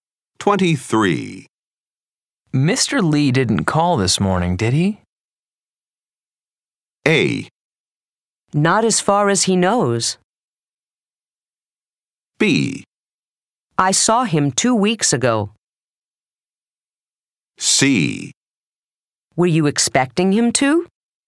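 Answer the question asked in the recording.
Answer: C: Were you expecting him to?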